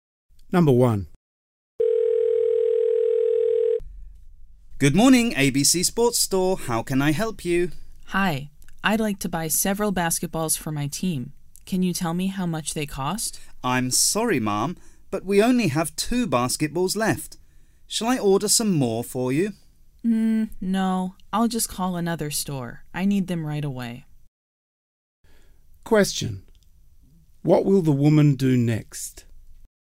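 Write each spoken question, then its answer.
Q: What will the woman do next?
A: Call another store.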